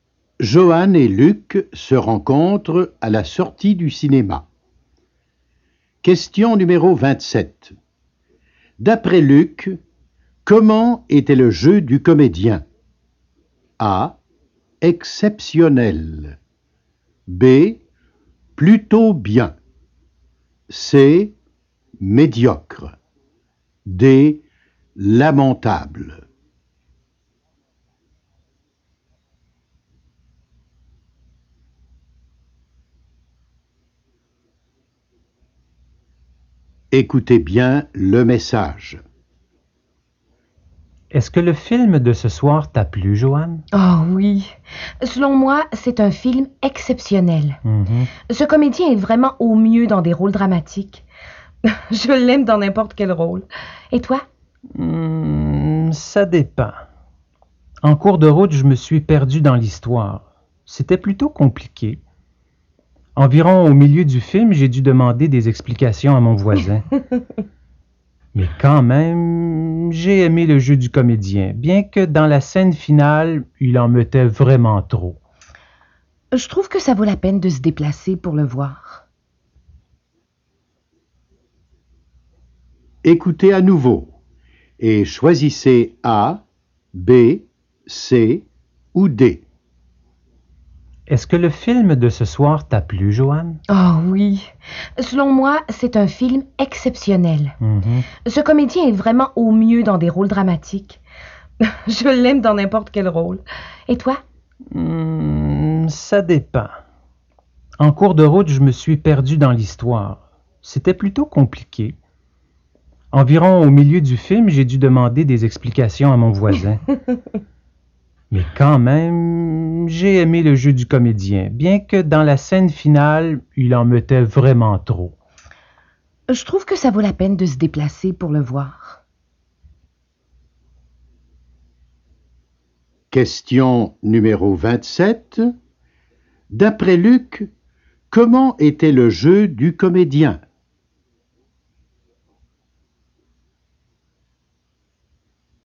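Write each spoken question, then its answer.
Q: D'après Luc, comment était le jeu du comédien ?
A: B: Plutôt bien.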